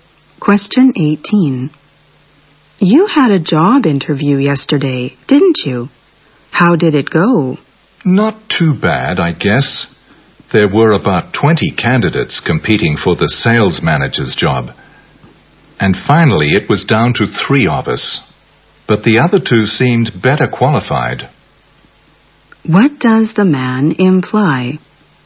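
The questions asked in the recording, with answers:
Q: What does the man imply?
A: He probably won't get the job.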